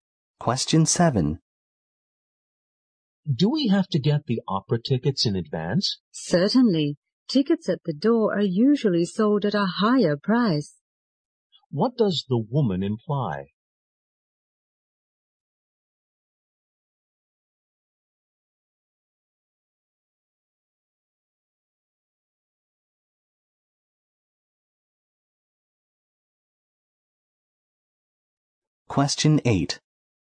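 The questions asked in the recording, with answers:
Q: What does the woman imply?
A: Buying tickets in advance is cheaper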